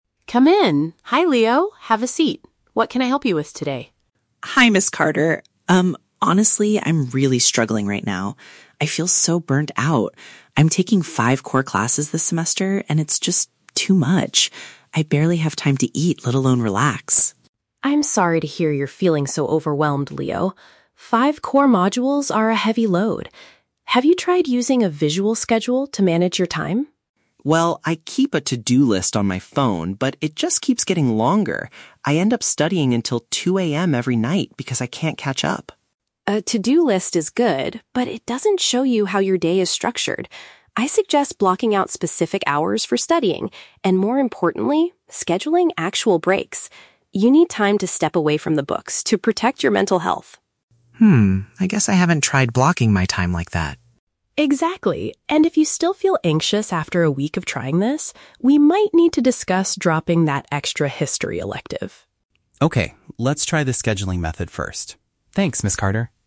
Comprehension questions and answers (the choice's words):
Listen to a conversation between a student and an academic advisor. Choose the correct answer (A, B, or C) for each question.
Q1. What is Leo's main problem?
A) He is feeling exhausted due to a heavy academic workload.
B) He is worried about failing his extra History elective.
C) He is having trouble finding enough money to buy food.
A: He is feeling exhausted due to a heavy academic workload.

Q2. What method is Leo currently using to keep track of his tasks?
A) He draws a visual calendar to organize his day.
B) He uses his smartphone to maintain a list of things to do.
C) He asks his friends to remind him about his deadlines.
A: He uses his smartphone to maintain a list of things to do.

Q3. What does Ms. Carter advise Leo to do first?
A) Immediately withdraw from one of his university classes.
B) Start his homework earlier so he does not stay up until 2 AM.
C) Plan specific study periods along with designated rest times.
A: Plan specific study periods along with designated rest times.

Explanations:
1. The Key: Leo says he feels "burnt out" and is taking "five core classes", which is "too much". This is paraphrased as feeling "exhausted due to a heavy academic workload". The Trap (B): The "History elective" is mentioned at the end of the audio, but Ms. Carter brings it up as a possible solution (dropping it), not because Leo is currently failing it (Mentioned but wrong context). The Trap (C): Leo says he "barely has time to eat", which might make students think of food/money, but the problem is a lack of time, not money (Plausible but not mentioned).
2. The Key: Leo says "I keep a to-do list on my phone". This matches option B perfectly. The Trap (A): A "visual schedule/calendar" is mentioned in the audio, but it is what Ms. Carter suggests he should do, not what he is currently doing (Mentioned but rejected). Plausible Trap (C): Having friends remind you of deadlines is a common study habit, but it is never mentioned in the conversation.
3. The Key: Ms. Carter suggests "blocking out specific hours for studying" and "scheduling actual breaks". This is paraphrased as planning "specific study periods along with designated rest times". The Trap (A): Withdrawing from a class (dropping the History elective) is mentioned, but Ms. Carter says they will discuss this only if he still feels anxious "after a week". It is not the first thing he should do. The Trap (B): Staying up until "2 AM" is mentioned by Leo as a problem. However, Ms. Carter doesn't tell him to simply start earlier; she tells him to restructure his whole day with time blocks.

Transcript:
Ms. Carter: Come in! Hi Leo, have a seat. What can I help you with today?
Carter. Um, honestly, I'm really struggling right now. I feel so burnt out. I'm taking five core classes this semester, and it's just... too much. I barely have time to eat, let alone relax.
Carter: I'm sorry to hear you're feeling so overwhelmed, Leo. Five core modules are a heavy load. Have you tried using a visual schedule to manage your time?
Leo: Well, I keep a to-do list on my phone, but it just keeps getting longer. I end up studying until 2 AM every night because I can't catch up.
Carter: A to-do list is good, but it doesn't show you how your day is structured. I suggest blocking out specific hours for studying, and more importantly, scheduling actual breaks. You need time to step away from the books to protect your mental health.
Leo: Hmm, I guess I haven't tried blocking my time like that.
Carter: Exactly. And if you still feel anxious after a week of trying this, we might need to discuss dropping that extra History elective.